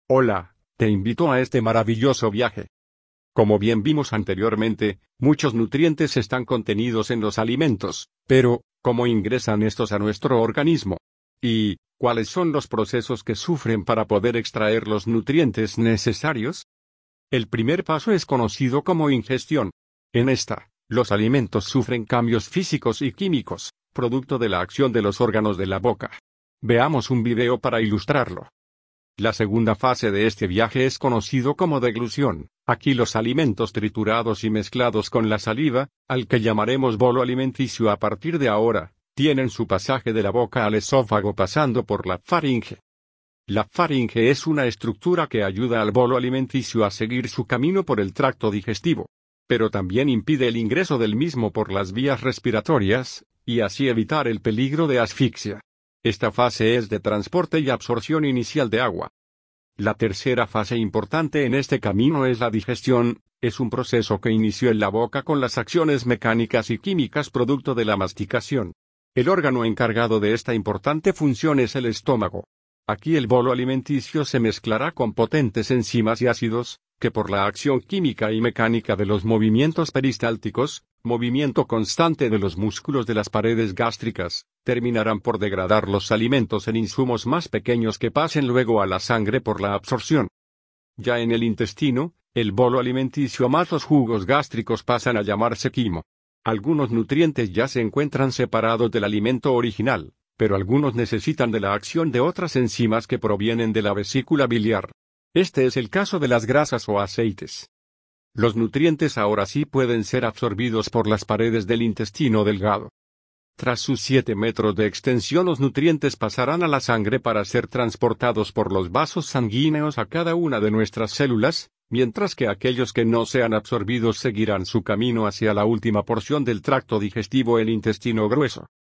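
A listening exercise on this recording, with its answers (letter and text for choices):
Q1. ¿Cuál o cuáles de los siguientes procesos se dan en la boca?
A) Digestión gástrica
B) Ingestión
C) Absorción intestinal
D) Eliminación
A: B) Ingestión

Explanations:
Lee el texto, o escucha el audio para lograr entender qué es lo que está sucediendo.

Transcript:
Cómo bien vimos anteriormente, muchos nutrientes están contenidos en los alimentos; pero ¿Cómo ingresan estos a nuestro organismo? y ¿Cuales son los procesos que sufren para poder extraer los nutrientes necesarios?
El primer paso es conocida como Ingestión. En ésta, los alimentos sufren cambios físicos y químicos, producto de la acción de los órganos de la boca. Veamos un video para ilustrarlo:
La segunda fase de este viaje es conocido como deglución, aquí los alimentos triturados y mezclados con la saliva (al que llamaremos Bolo alimenticio a partir de ahora) tienen su pasaje de la boca al esófago pasando por la Faringe:
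La Faringe es una estructura que ayuda al bolo alimenticios a seguir su camino por el Tracto digestivo. Pero también impide el ingreso del mismo por las vías respiratorias, y así evitar el peligro de asfixia. Ésta fase es de transporte y absorción inicial de agua.
La tercera fase importante en este camino es la Digestión, es un proceso que inició el la boca con las acciones mecánicas y químicas producto de la masticación. El órgano encargado de esta importante función es el Estómago. Aquí el bolo alimenticio se mezclará con potentes enzimas y ácidos, que por la acción química y mecánica de los movimientos peristálticos (movimiento constante de los músculos de las paredes gástricas), terminarán por degradar los alimentos en insumos más pequeños que pasen luego a la sangre por la Absorción.
Ya en el intestino (el bolo alimenticio más los jugos gástricos) pasan a llamarse Quimo. algunos nutrientes ya se encuentran separados del alimento original, pero algunos necesitan de la acción de otras enzimas que provienen de la vesícula biliar. 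Este es el caso de las grasas y/o aceites.
Los nutrientes ahora sí pueden ser absorbidos por las paredes del intestino delgado. Tras sus 7 metros aproximado de extensión, los nutrientes pasarán a la sangre para ser transportados por los vasos sanguíneos a cada una de nuestras células; mientras que aquellos que no sean absorbidos seguirán hacia el intestino Grueso y la última porción del tracto digestivo para ser desechados.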